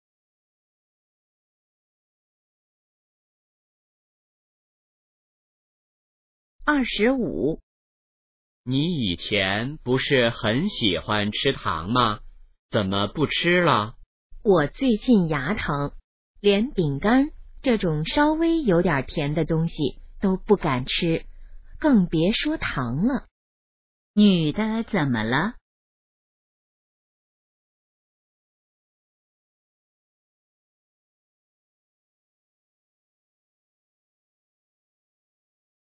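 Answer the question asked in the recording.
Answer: 牙疼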